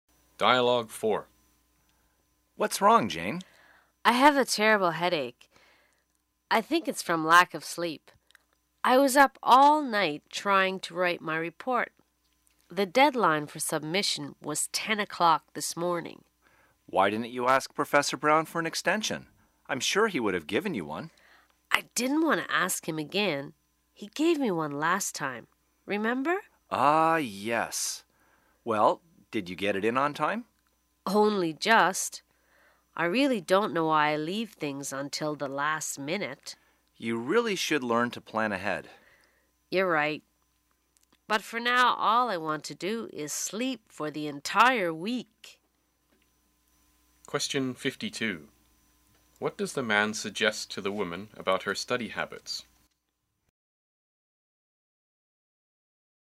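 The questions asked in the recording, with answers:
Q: What does the man suggest to the woman about her study habits?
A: She should learn to plan ahead.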